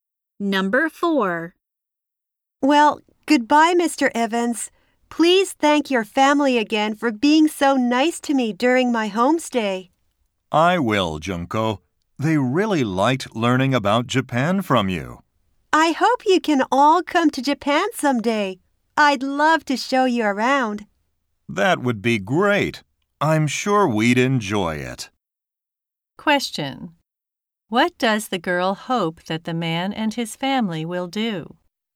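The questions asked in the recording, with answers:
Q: What does the girl hope that the man and his family will do?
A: Come to Japan someday.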